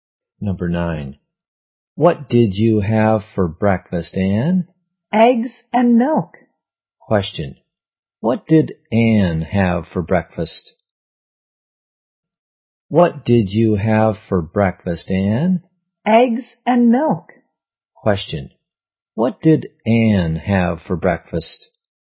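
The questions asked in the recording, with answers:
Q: Question. What did Anne have for breakfast?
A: Eggs and milk.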